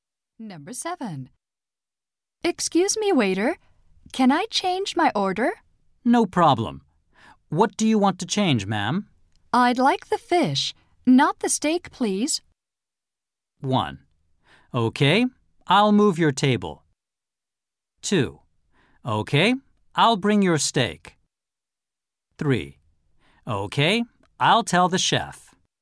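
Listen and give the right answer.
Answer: 3: Okay, I'll tell the chef.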